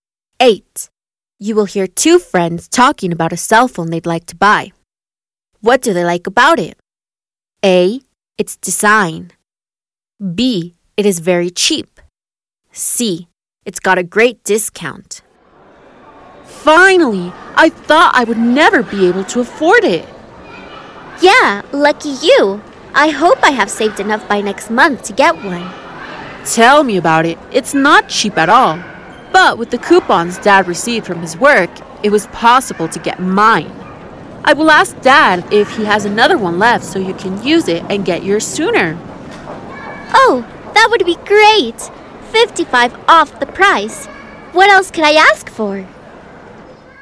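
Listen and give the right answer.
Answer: C: It's got a great discount.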